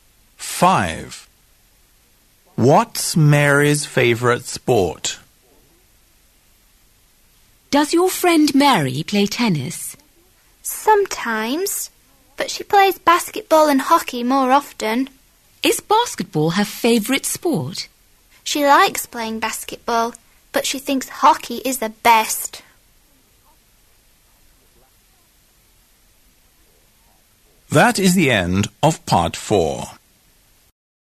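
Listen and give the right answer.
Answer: Hockey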